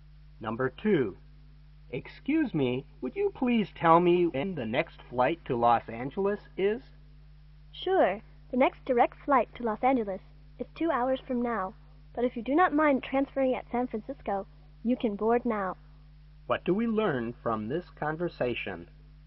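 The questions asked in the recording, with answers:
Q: What do we learn from this conversation?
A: The man can fly now if he changes planes in San Francisco.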